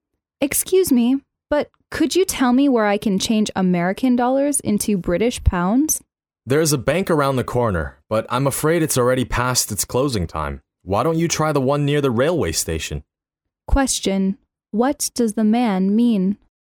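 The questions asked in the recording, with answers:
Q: What does the man mean?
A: The nearby bank is closed, so she should try the bank near the railway station.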